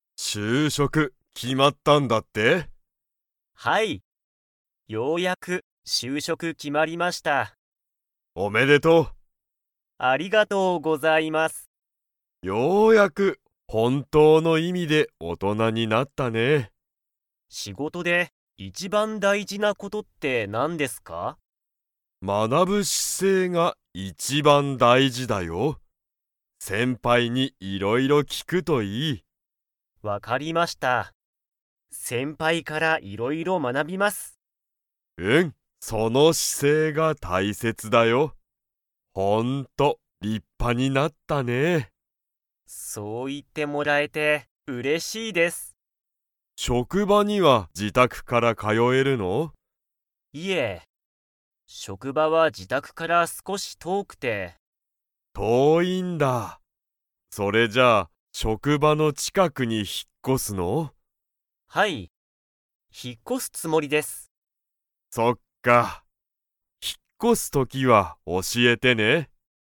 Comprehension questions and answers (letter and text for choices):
Comprehension Quiz (Skip if you don't understand the conversation yet)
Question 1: 仕事しごとで、一番いちばん大事だいじなことはなんですか?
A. 仕事しごとの速はやさ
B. 学まなぶ姿勢しせい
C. 優やさしさ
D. 先輩せんぱいと遊あそぶこと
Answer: B. 学まなぶ姿勢しせい

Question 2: つとむは つもりだ。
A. 引ひっ越こす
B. 引ひっ越こさない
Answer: A. 引ひっ越こす

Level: Level 4